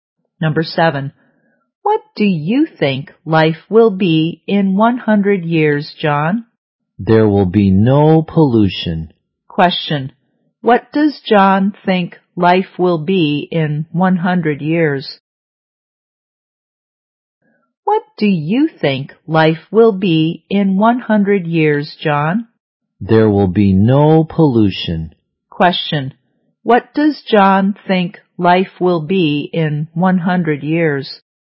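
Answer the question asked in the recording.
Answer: There will be no pollution.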